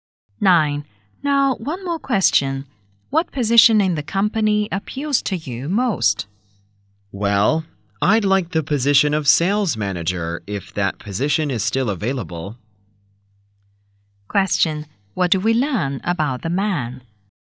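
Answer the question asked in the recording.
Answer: He is at a job interview and wants to be sales manager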